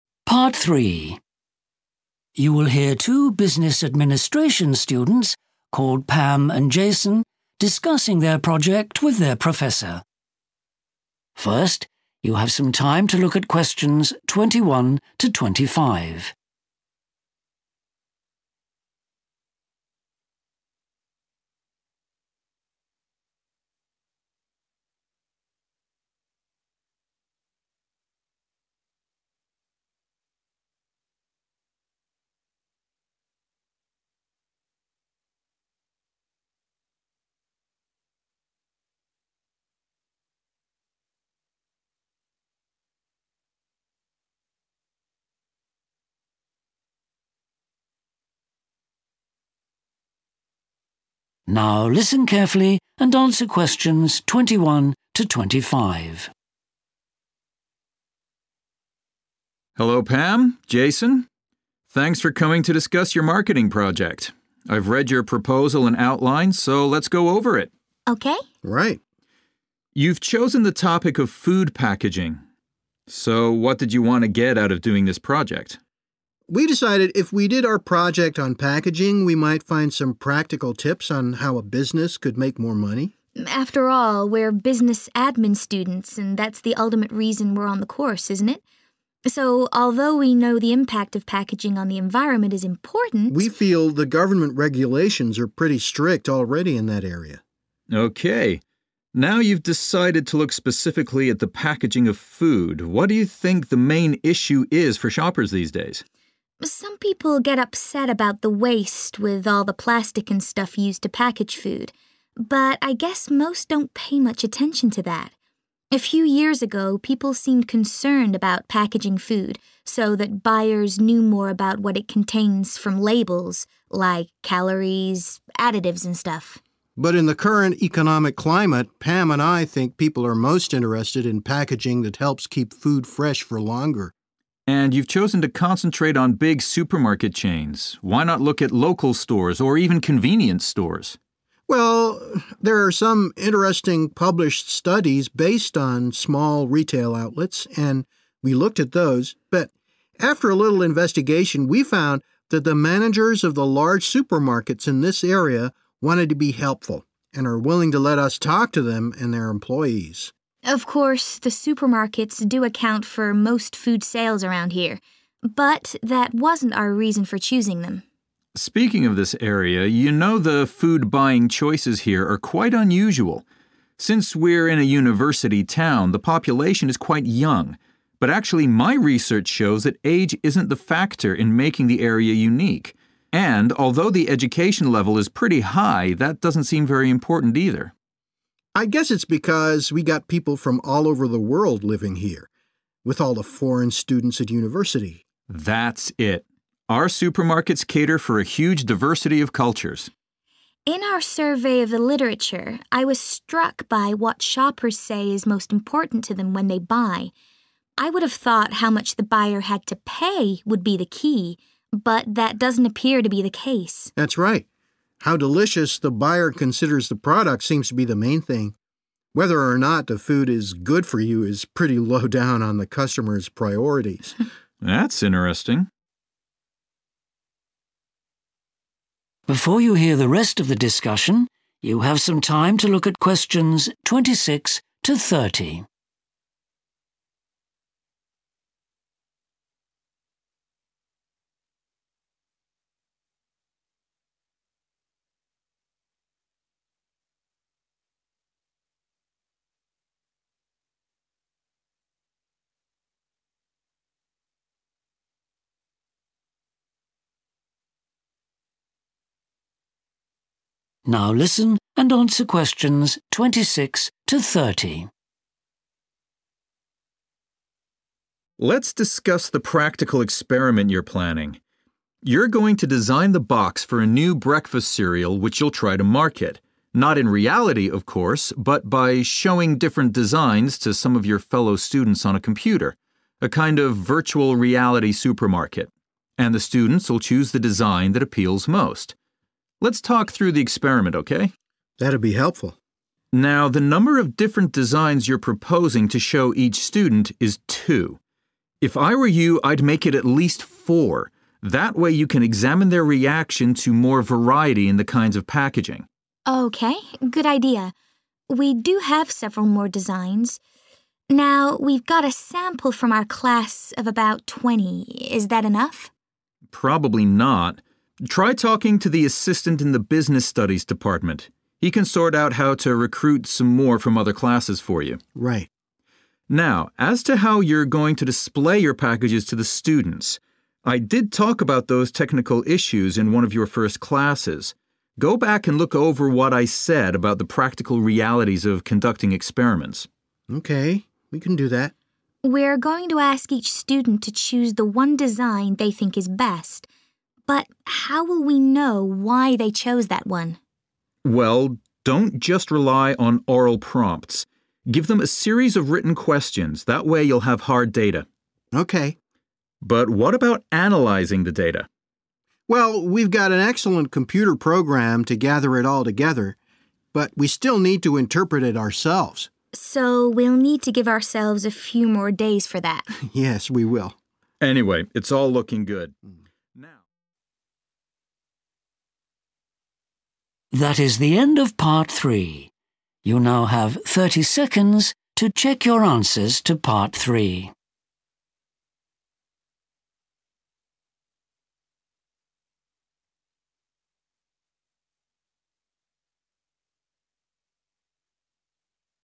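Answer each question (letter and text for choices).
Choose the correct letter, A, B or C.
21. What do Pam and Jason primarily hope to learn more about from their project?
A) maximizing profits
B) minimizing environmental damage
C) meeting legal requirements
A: A) maximizing profits

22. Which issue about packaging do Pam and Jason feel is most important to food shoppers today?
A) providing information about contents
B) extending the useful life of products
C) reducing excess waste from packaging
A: B) extending the useful life of products

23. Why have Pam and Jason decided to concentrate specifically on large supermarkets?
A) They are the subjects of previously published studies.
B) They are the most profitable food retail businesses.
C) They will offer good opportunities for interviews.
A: C) They will offer good opportunities for interviews.

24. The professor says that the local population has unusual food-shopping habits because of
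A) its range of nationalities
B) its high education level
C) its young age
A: A) its range of nationalities

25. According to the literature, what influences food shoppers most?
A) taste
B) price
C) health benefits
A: A) taste

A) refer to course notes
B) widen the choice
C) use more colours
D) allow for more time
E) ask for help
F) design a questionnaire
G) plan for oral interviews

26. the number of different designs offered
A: B) widen the choice

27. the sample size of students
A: E) ask for help

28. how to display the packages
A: A) refer to course notes

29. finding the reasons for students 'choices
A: F) design a questionnaire

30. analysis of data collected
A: D) allow for more time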